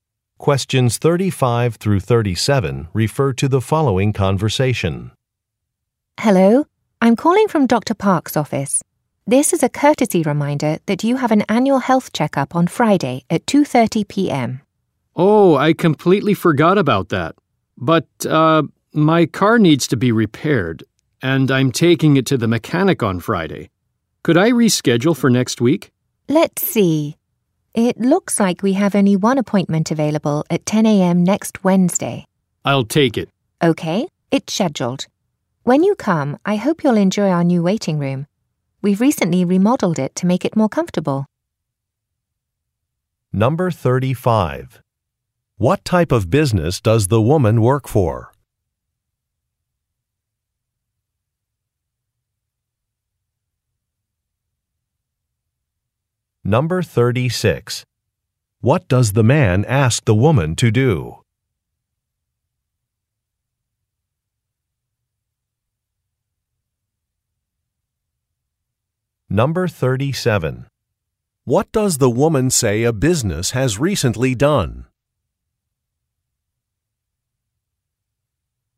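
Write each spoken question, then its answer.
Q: What type of business does the woman work for?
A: A doctor's office

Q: What does the man ask the woman to do?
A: Reschedule his appointment

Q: What does the woman say a business has recently done?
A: Remodeled its waiting room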